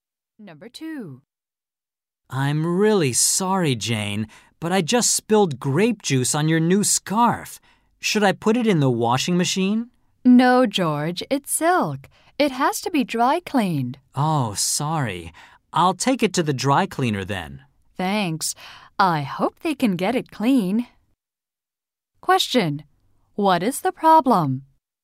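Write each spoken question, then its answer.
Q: What is the problem?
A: George spilled grape juice on Jane's new silk scarf.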